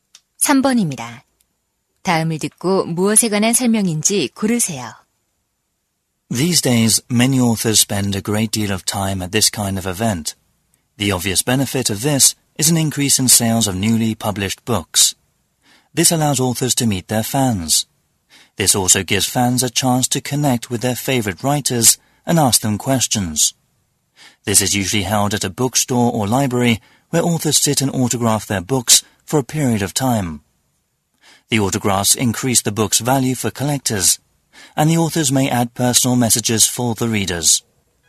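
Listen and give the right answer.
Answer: 작가 사인회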